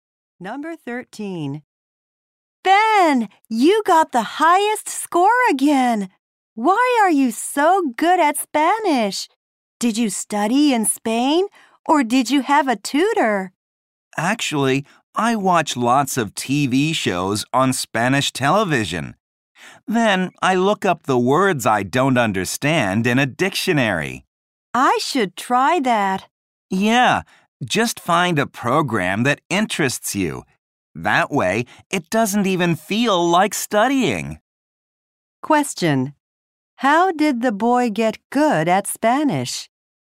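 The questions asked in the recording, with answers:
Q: How did the boy get good at Spanish?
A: By watching Spanish TV shows.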